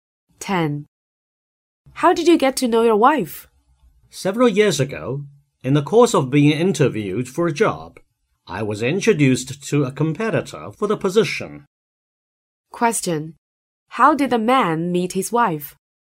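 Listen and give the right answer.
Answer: She was competing with him for a job he was interviewing for.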